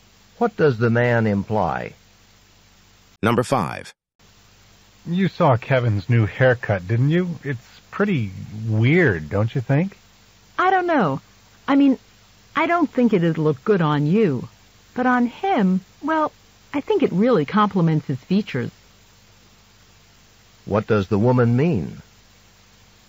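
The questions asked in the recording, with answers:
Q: What does the woman mean?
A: She thinks the haircut looks good on Kevin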